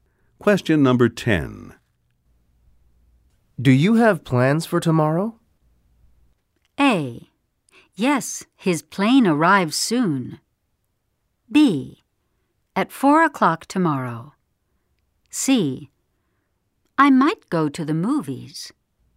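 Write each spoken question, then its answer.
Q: Do you have plans for tomorrow?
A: C: I might go to the movies.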